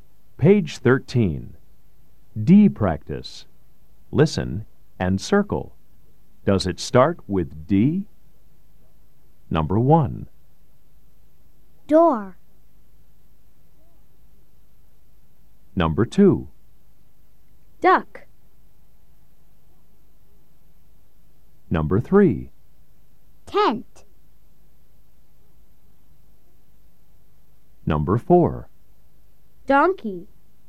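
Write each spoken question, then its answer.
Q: Does it start with D? Number 1. Door.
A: Yes

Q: Duck.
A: Yes

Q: Tent.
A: No

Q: Donkey.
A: Yes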